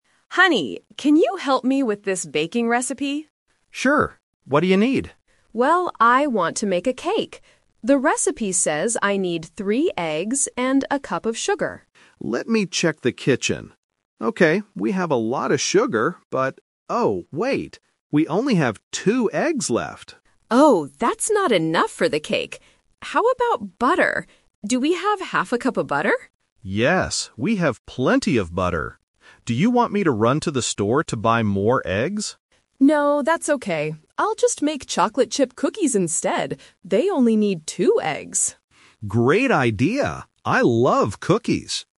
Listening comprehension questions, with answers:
Listen to the conversation between a husband and wife and choose the correct answer (A, B, or C) for each question.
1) What did the wife originally want to make?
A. A cake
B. Chocolate chip cookies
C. Bread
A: A. A cake

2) What is the problem with the ingredients?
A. They do not have any sugar.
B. They do not have enough eggs.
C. They need to buy more butter.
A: B. They do not have enough eggs.

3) What are they going to do next?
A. Go to the supermarket to buy eggs.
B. Make a smaller cake.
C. Bake cookies instead.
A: C. Bake cookies instead.

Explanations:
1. At the beginning of the conversation, the wife clearly says, "I want to make a cake." Option (B) is a trap; she decides to make cookies at the end, but it was not her original plan. Option (C) is a plausible baked good but is never mentioned.
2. The recipe needs three eggs, but the husband says, "We only have two eggs left." Option (A) is a trap; sugar is mentioned, but the husband says they have "a lot of sugar." Option (C) is a trap; butter is mentioned, but they have "plenty of butter."
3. Because they do not have enough eggs for a cake, the wife says, "I'll just make chocolate chip cookies instead." Option (A) is a trap; the husband offers to go to the store, but the wife says, "No, that's okay." Option (B) is a logical idea, but they do not talk about it.

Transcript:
Wife: Honey, can you help me with this baking recipe?
Husband: Sure. What do you need?
Wife: Well, I want to make a cake. The recipe says I need three eggs and a cup of sugar.
Husband: Let me check the kitchen. Okay, we have a lot of sugar, but... oh, wait. We only have two eggs left.
Wife: Oh, that's not enough for the cake. How about butter? Do we have half a cup of butter?
Husband: Yes, we have plenty of butter. Do you want me to run to the store to buy more eggs?
Wife: No, that's okay. I'll just make chocolate chip cookies instead.

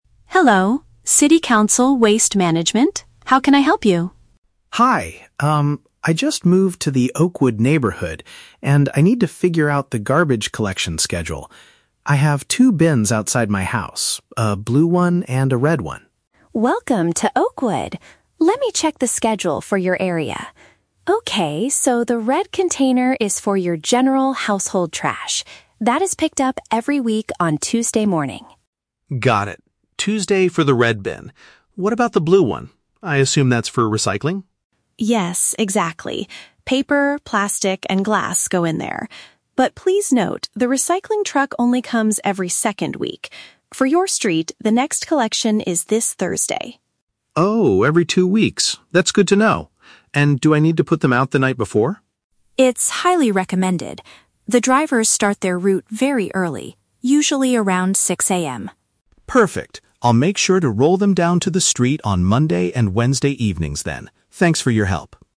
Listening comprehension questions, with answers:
Listen to the telephone conversation between a new resident and a city council operator, then choose the correct answer (A, B, or C) for each question.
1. Why is the man calling the City Council?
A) To request a new blue recycling bin for his home.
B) To find out when his rubbish will be taken away.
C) To complain about the garbage truck drivers.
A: B) To find out when his rubbish will be taken away.

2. How often is the recyclable waste collected?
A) Every Tuesday morning.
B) Every fourteen days.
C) Early every Thursday morning.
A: B) Every fourteen days.

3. What does the operator advise the man to do?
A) Leave the containers on the street the evening before.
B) Wash the plastic and glass items before recycling them.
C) Wake up at 6:00 AM to give the trash to the drivers.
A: A) Leave the containers on the street the evening before.

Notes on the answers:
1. Mark says he needs to "figure out the garbage collection schedule." Option (B) paraphrases this idea ("find out" = "figure out", "rubbish will be taken away" = "garbage collection"). Option (A) is a trap; the "blue bin" is mentioned, but he already has one outside his house, he doesn't need to request a new one. Option (C) is a trap; the "drivers" are mentioned later, but he is not complaining.
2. The operator says the recycling truck (blue bin) comes "every second week." Option (B) uses the paraphrase "fourteen days" for two weeks. Option (A) is a trap; Tuesday is the schedule for the red bin (general trash). Option (C) is a trap; the next collection is this Thursday, but it does not happen every Thursday.
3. Mark asks if he needs to "put them out the night before" and the operator replies, "It's highly recommended." Option (A) uses paraphrasing ("leave the containers on the street" for "put them out", "the evening before" for "the night before"). Option (B) is a plausible real-life rule, but washing items is never mentioned in the audio. Option (C) is a trap; 6:00 AM is when the drivers start their route, but the resident doesn't need to wake up to meet them.

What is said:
Operator: Hello, City Council Waste Management. How can I help you?
Mark: Hi, um, I just moved to the Oakwood neighborhood, and I need to figure out the garbage collection schedule. I have two bins outside my house: a blue one and a red one.
Operator: Welcome to Oakwood! Let me check the schedule for your area. Okay, so the red container is for your general household trash. That is picked up every week on Tuesday morning.
Mark: Got it. Tuesday for the red bin. What about the blue one? I assume that's for recycling?
Operator: Yes, exactly. Paper, plastic, and glass go in there. But please note, the recycling truck only comes every second week. For your street, the next collection is this Thursday.
Mark: Oh, every two weeks? That's good to know. And do I need to put them out the night before?
Operator: It's highly recommended. The drivers start their route very early, usually around 6:00 AM.
Mark: Perfect. I'll make sure to roll them down to the street on Monday and Wednesday evenings then. Thanks for your help!

